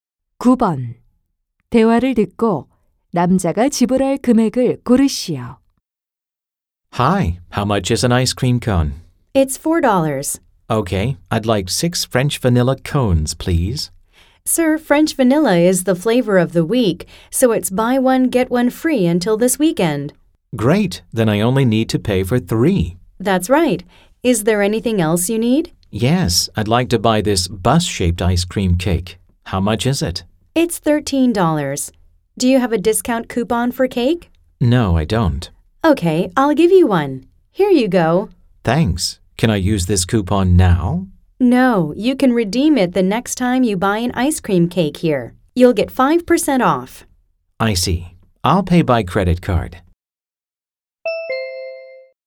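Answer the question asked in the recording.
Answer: 25달러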